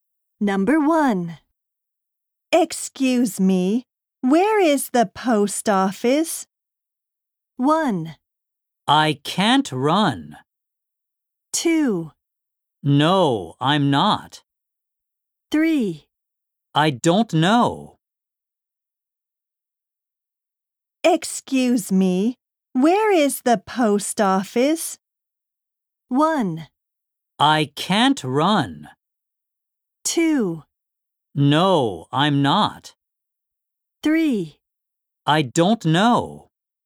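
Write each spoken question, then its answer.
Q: Excuse me, where is the post office?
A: 3: I don't know.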